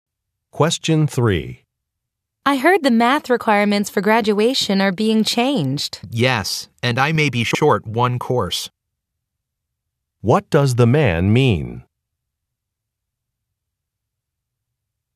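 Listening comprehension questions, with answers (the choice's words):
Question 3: What does the man mean?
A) He is not sure what course to take.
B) He may not meet the graduation requirements.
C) The math course is too short.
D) The graduation date has been changed.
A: He may not meet the graduation requirements.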